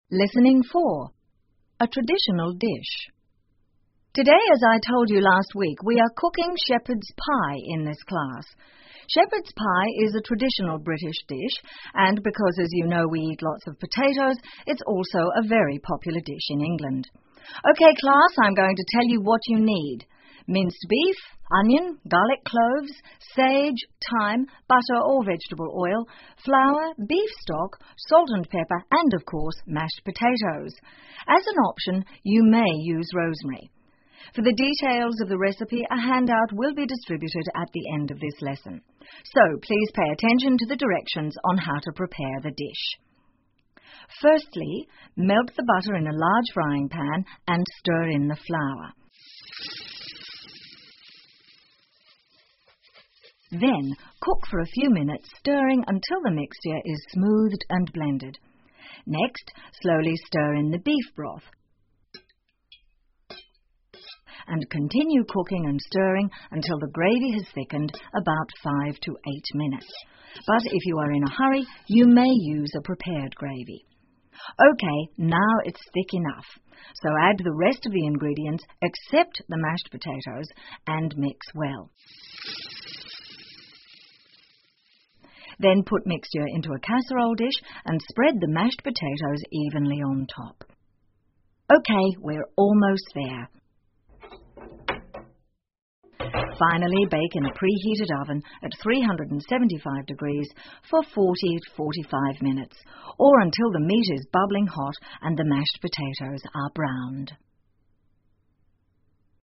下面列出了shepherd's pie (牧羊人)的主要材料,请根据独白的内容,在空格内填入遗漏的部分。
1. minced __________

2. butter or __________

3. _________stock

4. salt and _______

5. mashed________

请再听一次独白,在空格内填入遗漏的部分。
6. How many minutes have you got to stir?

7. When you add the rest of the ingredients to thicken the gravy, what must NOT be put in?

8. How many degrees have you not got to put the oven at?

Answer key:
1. beef
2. vegetable oil
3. beef
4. pepper
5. potatoes
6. five to eight minutes
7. Mashed potatoes
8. 375 degrees

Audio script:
Today, as I told you last week, we are cooking shepherd's pie in this class. Shepherd's pie is a traditional British dish and because, as you know, we eat lots of potatoes, it's also a very popular dish in England. OK, class, I'm going to tell you what you need. Minced beef, onion, garlic cloves, sage, thyme, butter or vegetable oil, flour, beef stock, salt and pepper, and of course, mashed potatoes. As an option, you may use rosemary. For the details of the recipe, a handout will be distributed at the end of this lesson. So, please pay attention to the directions on how to prepare the dish.
Firstly, melt the butter in a large frying pan and stir in the flour. Then, cook for a few minutes stirring until the mixture is smooth and blended. Next, slowly stir in the beef broth and continue cooking and stirring until the gravy has thickened, about five to eight minutes. But, if you are in a hurry, you may use a prepared gravy.
OK, now, it's thick enough. So, add the rest of the ingredients except the mashed potatoes and mix well. Then put mixture into a casserole dish and spread the mashed potatoes evenly on top.
OK, we're almost there. Finally, bake in a preheated oven at 375 degrees for 40-45 minutes or until the meat is bubbling hot and the mashed potatoes are browned.